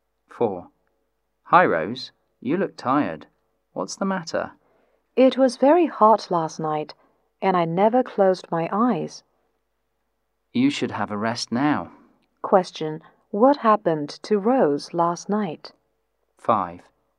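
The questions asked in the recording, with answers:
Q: What happened to Rose last night?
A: She couldn't sleep because it was very hot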